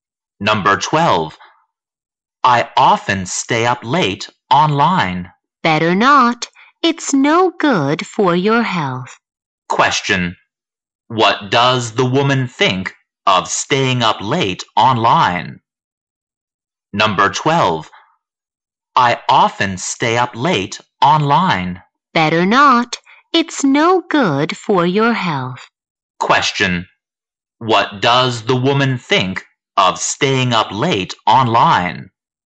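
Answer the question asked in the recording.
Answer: It's no good for your health.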